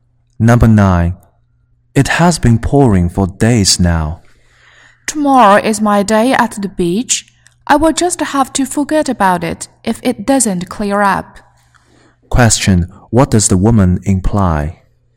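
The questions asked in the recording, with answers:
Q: What does the woman imply?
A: She won't go to the beach if the rain doesn't stop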